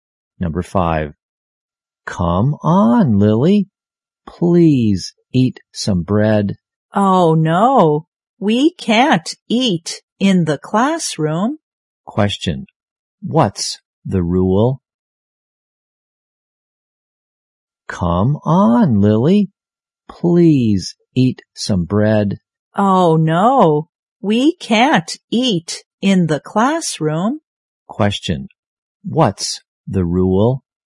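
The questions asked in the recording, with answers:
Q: What's the rule?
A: They can't eat in the classroom.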